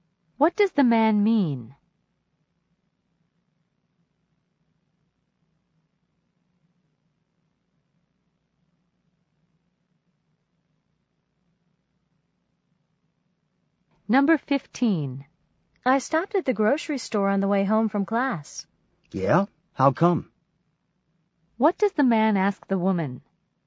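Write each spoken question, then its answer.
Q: What does the man ask the woman?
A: Why she stopped at the grocery store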